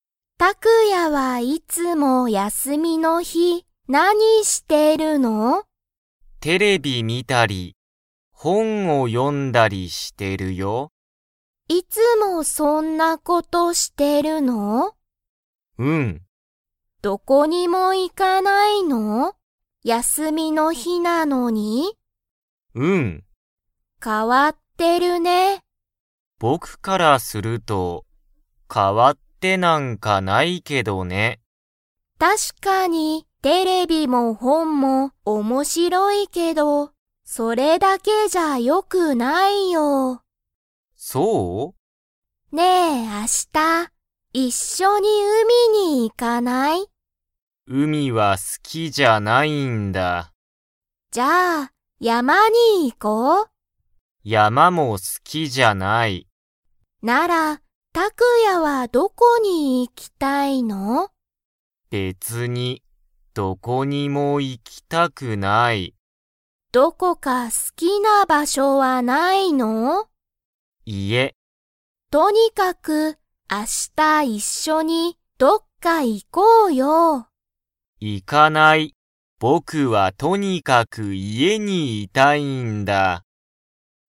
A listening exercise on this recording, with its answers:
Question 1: タクヤは、いつも____にテレビ観(み)たり、本(ほん)を読(よ)む。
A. 朝(あさ)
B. 仕事(しごと)の後(あと)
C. 休(やす)みの日(ひ)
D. 夜(よる)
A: 休(やす)みの日(ひ)

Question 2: マイとタクヤは、明日一緒(あしたいっしょ)にどこか行(い)きますか?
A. はい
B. いいえ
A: いいえ

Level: Level 2

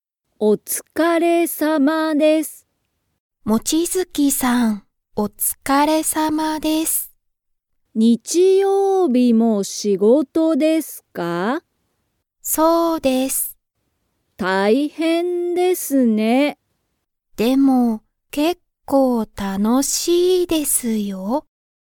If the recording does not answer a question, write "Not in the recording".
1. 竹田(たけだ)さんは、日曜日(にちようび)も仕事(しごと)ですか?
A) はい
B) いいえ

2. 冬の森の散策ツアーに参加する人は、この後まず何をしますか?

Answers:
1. はい
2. Not in the recording

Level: Level 1

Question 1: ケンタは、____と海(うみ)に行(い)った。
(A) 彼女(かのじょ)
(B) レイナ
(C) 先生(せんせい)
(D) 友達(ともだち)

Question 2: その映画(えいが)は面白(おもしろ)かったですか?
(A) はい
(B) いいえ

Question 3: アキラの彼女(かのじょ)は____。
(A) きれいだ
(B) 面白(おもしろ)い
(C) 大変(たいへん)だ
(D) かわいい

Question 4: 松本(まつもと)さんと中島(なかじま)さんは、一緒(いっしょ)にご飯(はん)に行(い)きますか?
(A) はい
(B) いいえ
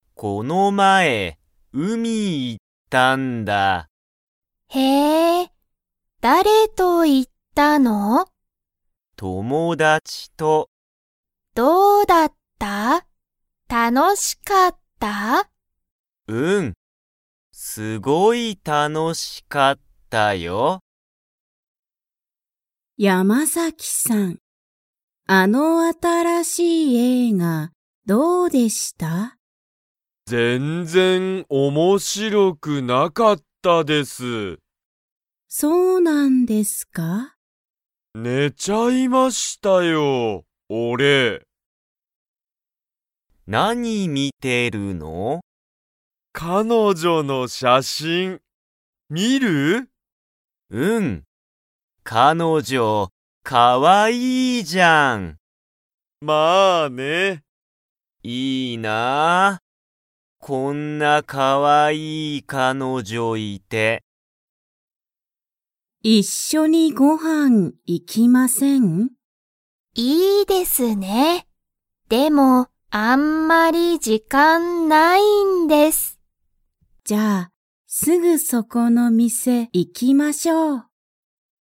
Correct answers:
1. 友達(ともだち)
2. いいえ
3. かわいい
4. はい

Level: Level 1

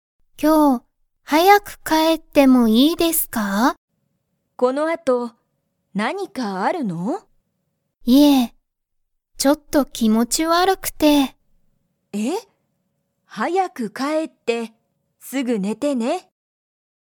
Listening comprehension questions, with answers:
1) 山田やまださんは、____気持きもち悪わるい。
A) ちょっと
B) すごく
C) よく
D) 毎日まいにち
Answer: ちょっと

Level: Level 1

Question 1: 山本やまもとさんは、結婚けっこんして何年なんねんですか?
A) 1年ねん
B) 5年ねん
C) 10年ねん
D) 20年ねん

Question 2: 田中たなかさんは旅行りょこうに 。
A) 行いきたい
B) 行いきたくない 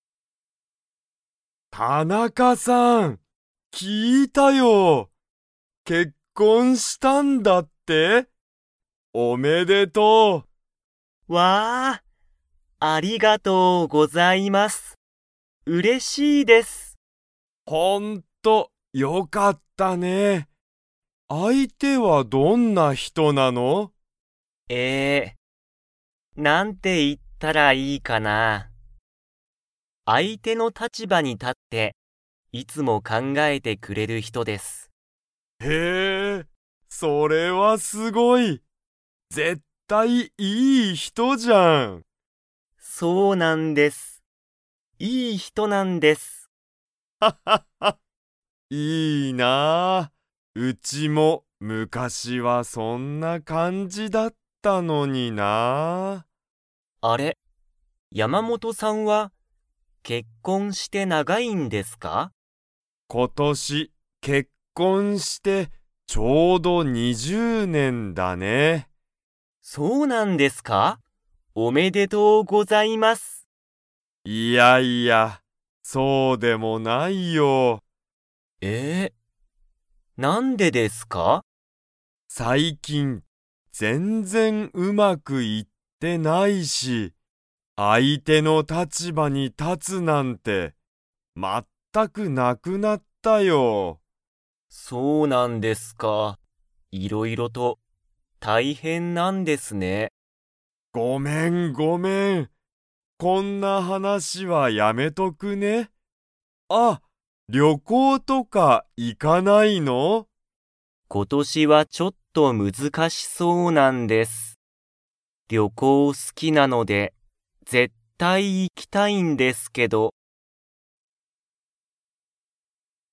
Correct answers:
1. 20年ねん
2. 行いきたい

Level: Level 3

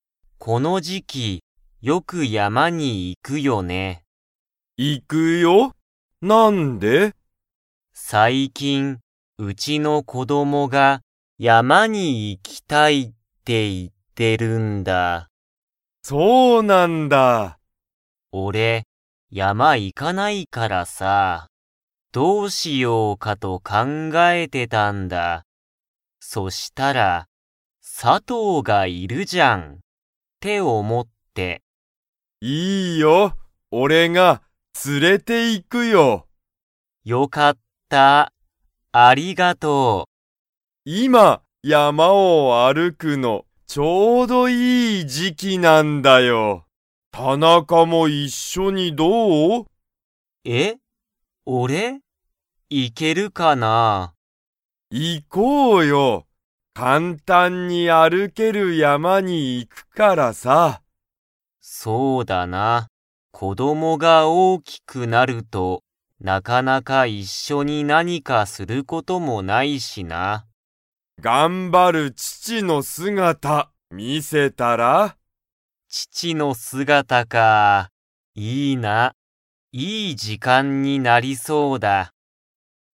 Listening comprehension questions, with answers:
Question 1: _____が山(やま)に行(い)きたいって言(い)っている。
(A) 佐藤(さとう)さんの友達(ともだち)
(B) 田中(たなか)さんの先生(せんせい)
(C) 佐藤(さとう)さんの家族(かぞく)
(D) 田中(たなか)さんの子供(こども)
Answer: 田中(たなか)さんの子供(こども)

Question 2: 田中(たなか)さんも一緒(いっしょ)に山やまに行(い)きますか?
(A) はい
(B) いいえ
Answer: はい

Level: Level 2

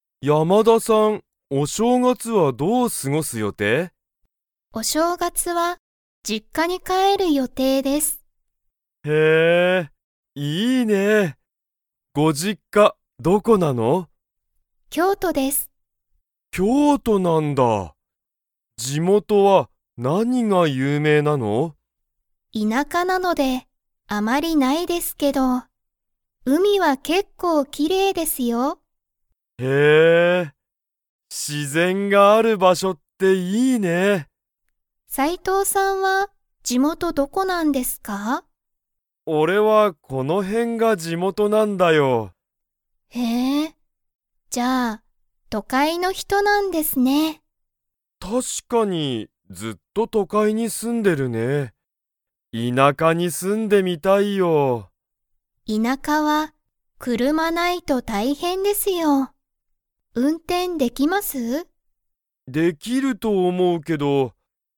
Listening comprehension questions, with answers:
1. 山田やまださんの地元じもとは、 が結構けっこう綺麗きれいだ。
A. 道みち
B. 街まち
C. 海うみ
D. 会社かいしゃ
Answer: 海うみ

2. 斉藤さいとうさんは、ずっと田舎いなかに住すんでいますか?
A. はい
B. いいえ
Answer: いいえ

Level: Level 4

